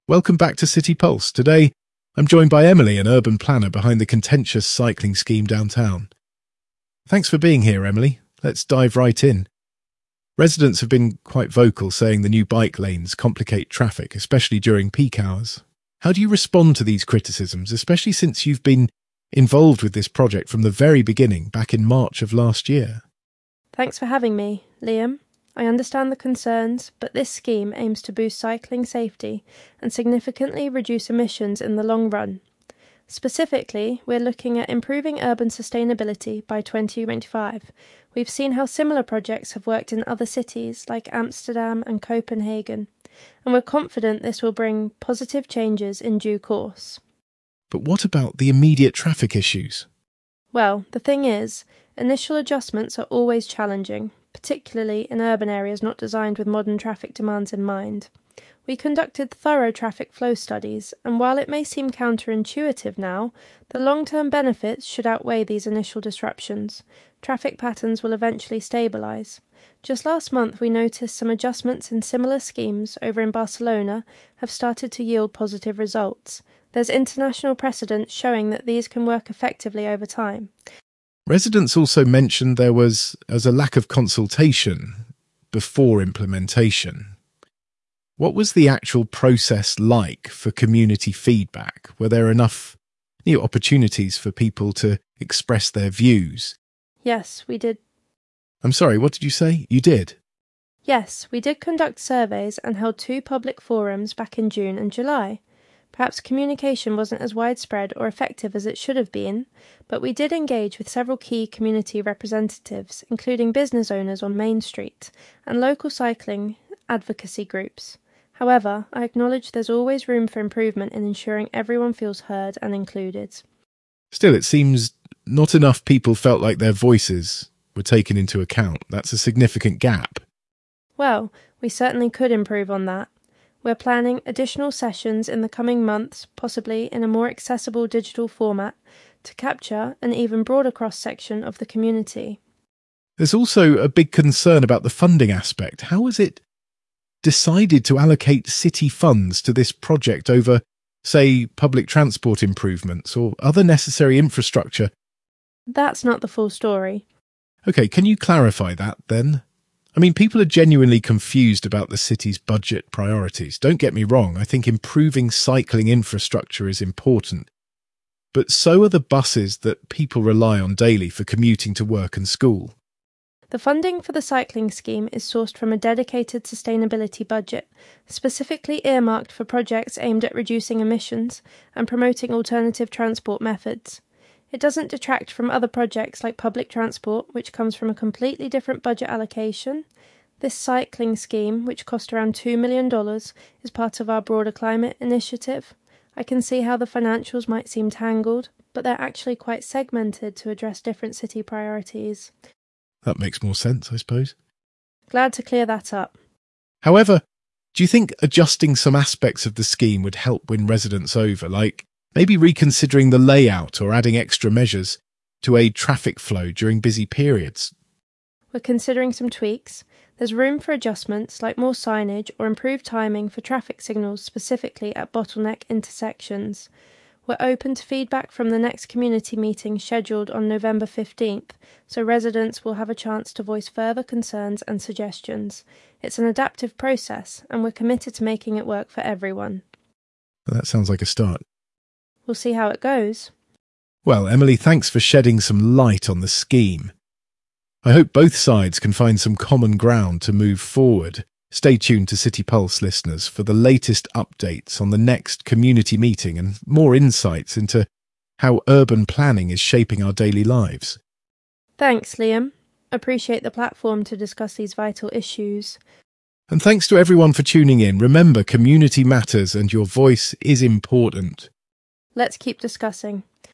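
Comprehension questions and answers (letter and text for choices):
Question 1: What is the primary goal of the new cycling scheme according to Emily?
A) To address traffic flow issues without immediate complications.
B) To improve urban sustainability by 2025.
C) To integrate cycling with existing public transport solutions.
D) To reduce the number of cars downtown immediately.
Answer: B) To improve urban sustainability by 2025.

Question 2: How does Emily address concerns about immediate traffic issues?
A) She says that initial challenges are expected but will improve.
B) She believes immediate adjustments will solve the problem.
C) She denies that traffic issues are a problem at all.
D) She claims traffic issues were exaggerated by residents.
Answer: A) She says that initial challenges are expected but will improve.

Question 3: What does Emily imply about the community feedback process?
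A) That communication could have been more effective.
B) Public forums were insufficient in gathering broad community input.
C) That community feedback was not a priority.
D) Some residents felt their views were adequately represented.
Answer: A) That communication could have been more effective.

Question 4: What is Emily's explanation for how the cycling scheme was funded?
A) The scheme was funded by reallocating overall city budget priorities.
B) It was funded by a dedicated sustainability budget.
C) It came from a shared budget with public transport projects.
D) The scheme was funded by reallocating funds from underutilized projects.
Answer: B) It was funded by a dedicated sustainability budget.

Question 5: What does Emily mean by saying 'That's not the full story'?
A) She wants to avoid the topic of budget allocations.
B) She thinks public transport improvements are less important than cycling.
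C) She wants to clarify that the cycling and public transport budgets are separate.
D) She believes the funding decision needs no further explanation.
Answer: C) She wants to clarify that the cycling and public transport budgets are separate.

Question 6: What does Emily suggest might happen during the next community meeting?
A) Residents will have a chance to propose alternative routes for the scheme.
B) No further changes will be made to the current layout.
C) Additional funding may be sourced to enhance current infrastructure.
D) Adjustments like more signage or signal timing improvements might be considered.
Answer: D) Adjustments like more signage or signal timing improvements might be considered.

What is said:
Liam: Welcome back to City Pulse! Today, I'm joined by Emily, an urban planner behind the contentious cycling scheme downtown. Thanks for being here, Emily. Let's dive right in. 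Residents have been quite vocal, saying the new bike lanes complicate traffic, especially during peak hours. How do you respond to these criticisms, especially since you've been involved with this project from the very beginning, back in March of last year?
Emily: Thanks for having me, Liam. I understand the concerns, but this scheme aims to boost cycling safety and significantly reduce emissions in the long run. Specifically, we're looking at improving urban sustainability by 2025. We've seen how similar projects have worked in other cities like Amsterdam and Copenhagen, and we're confident this will bring positive changes in due course.
Liam: But what about the immediate traffic issues?
Emily: Well, the thing is, initial adjustments are always challenging, particularly in urban areas not designed with modern traffic demands in mind. We conducted thorough traffic flow studies, and while it may seem counterintuitive now, the long-term benefits should outweigh these initial disruptions. 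Traffic patterns will eventually stabilize. Just last month, we noticed some adjustments in similar schemes over in Barcelona have started to yield positive results. There's international precedence showing that these can work effectively over time.
Liam: Residents also mentioned there was a lack of consultation before implementation. What was the actual process like for community feedback? Were there enough opportunities for people to express their views?
Emily: Yes, we did—
Liam: I'm sorry, what did you say? You did?
Emily: Yes, we did conduct surveys and held two public forums back in June and July. Perhaps communication wasn't as widespread or effective as it should've been, but we did engage with several key community representatives, including business owners on Main Street and local cycling advocacy groups. However, I acknowledge there's always room for improvement in ensuring everyone feels heard and included.
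Liam: Still, it seems not enough people felt like their voices were taken into account. That's a significant gap.
Emily: Well, we certainly could improve on that. We're planning additional sessions in the coming months, possibly in a more accessible digital format, to capture an even broader cross-section of the community.
Liam: There's also a big concern about the funding aspect. How was it decided to allocate city funds to this project over, say, public transport improvements or other necessary infrastructure—
Emily: That's not the full story.
Liam: Okay, can you clarify that, then? I mean, people are genuinely confused about the city's budget priorities. Don't get me wrong, I think improving cycling infrastructure is important, but so are the buses that people rely on daily for commuting to work and school.
Emily: The funding for the cycling scheme is sourced from a dedicated sustainability budget, specifically earmarked for projects aimed at reducing emissions and promoting alternative transport methods. 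It doesn't detract from other projects like public transport, which comes from a completely different budget allocation. This cycling scheme, which cost around $2 million, is part of our broader climate initiative. I can see how the financials might seem tangled, but they're actually quite segmented to address different city priorities.
Liam: That makes more sense, I suppose.
Emily: Glad to clear that up.
Liam: However, do you think adjusting some aspects of the scheme would help win residents over? Like, maybe reconsidering the layout or adding extra measures to aid traffic flow during busy periods?
Emily: We're considering some tweaks. There's room for adjustments, like more signage or improved timing for traffic signals specifically at bottleneck intersections. We're open to feedback from the next community meeting scheduled on November 15th, so residents will have a chance to voice further concerns and suggestions. 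It's an adaptive process, and we're committed to making it work for everyone.
Liam: That sounds like a start.
Emily: We'll see how it goes.
Liam: Well, Emily, thanks for shedding some light on the scheme. I hope both sides can find some common ground to move forward. Stay tuned to City Pulse, listeners, for the latest updates on the next community meeting and more insights into how urban planning is shaping our daily lives.
Emily: Thanks, Liam. Appreciate the platform to discuss these vital issues.
Liam: And thanks to everyone for tuning in.

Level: C1 Advanced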